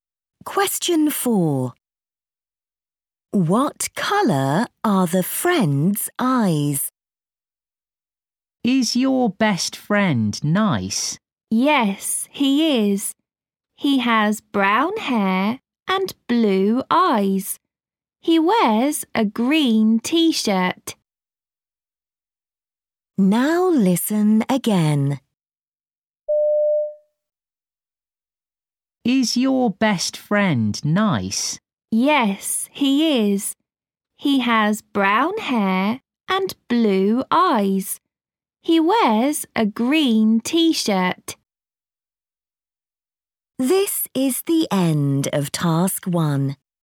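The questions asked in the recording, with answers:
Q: What colour are the friend's eyes?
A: Blue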